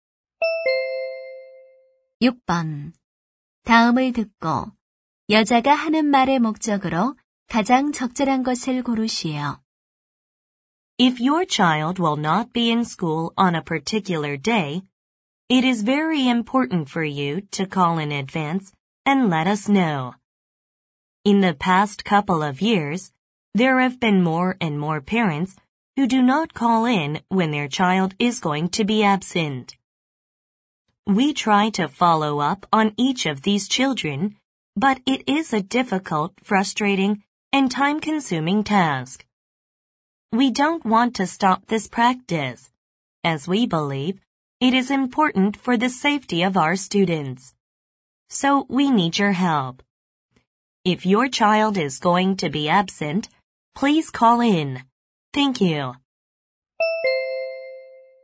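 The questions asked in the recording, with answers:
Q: 다음을 듣고 여자가 하는 말의 목적으로 가장 적절한 것을 고르시오.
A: 자녀 결석 시 미리 전화해 줄 것을 요청하려고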